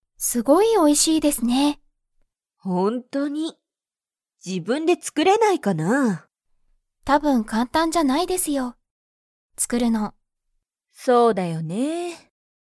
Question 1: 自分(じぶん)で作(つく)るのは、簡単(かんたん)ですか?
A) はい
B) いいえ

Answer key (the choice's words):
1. いいえ

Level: Level 1